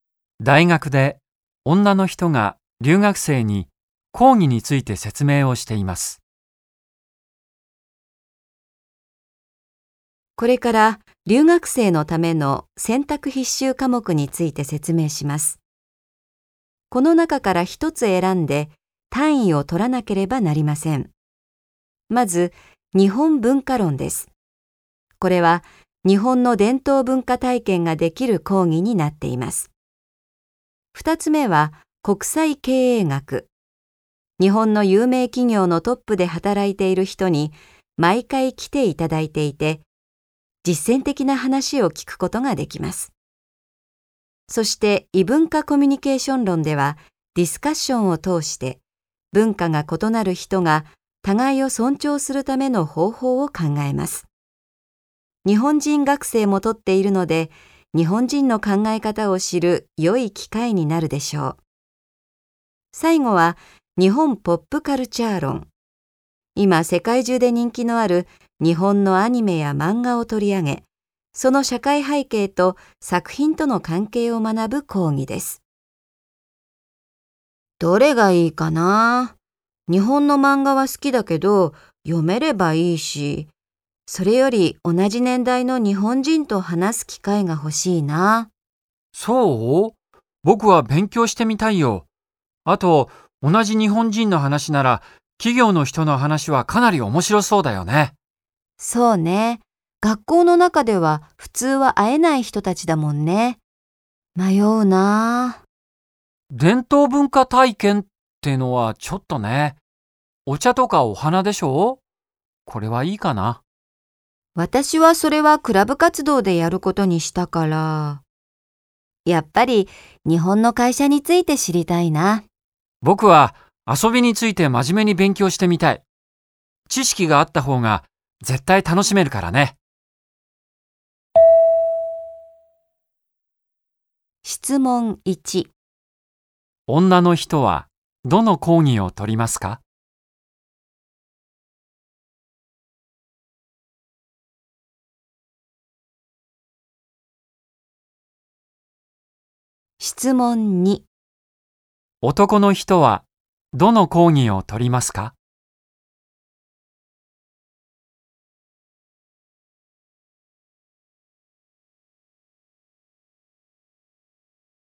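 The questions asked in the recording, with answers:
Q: 女の人はどの講義を取りますか?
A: 国際経営学

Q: 男の人はどの講義を取りますか?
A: 日本ポップカルチャー論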